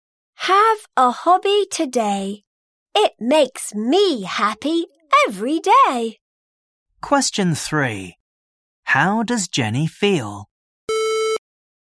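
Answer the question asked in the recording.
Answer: Happy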